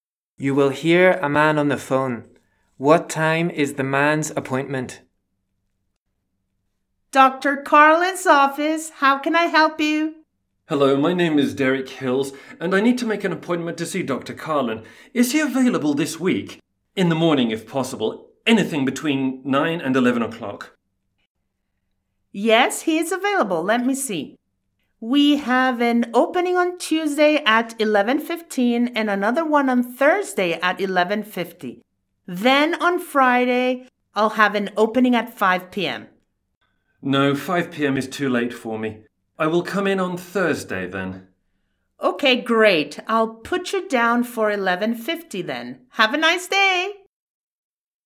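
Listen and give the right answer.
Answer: 11:50 on Thursday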